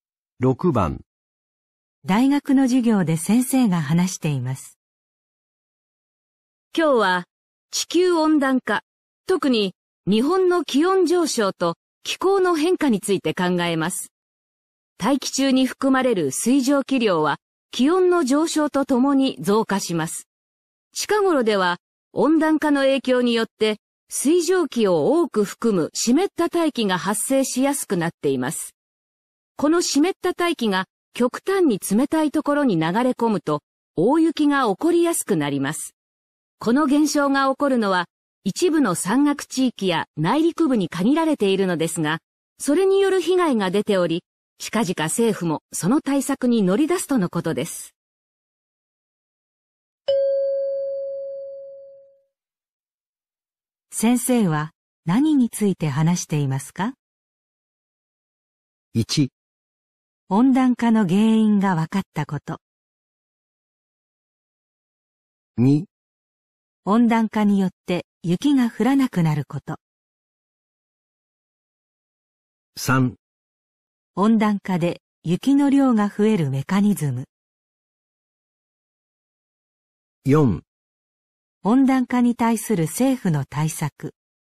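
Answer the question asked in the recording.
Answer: 3: 温暖化で雪の量が増えるメカニズム。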